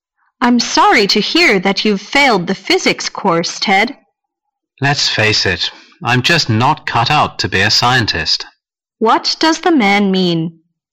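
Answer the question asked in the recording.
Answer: He isn't suited to being a scientist.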